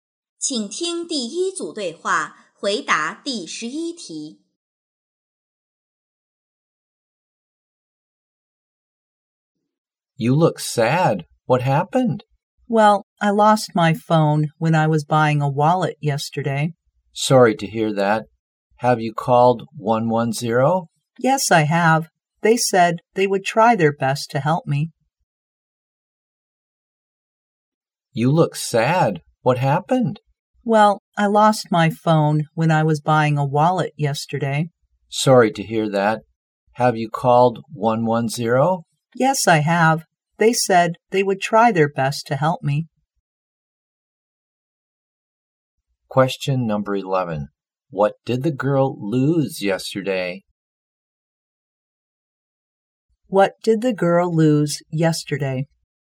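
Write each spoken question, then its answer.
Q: What did the girl lose yesterday?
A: Her phone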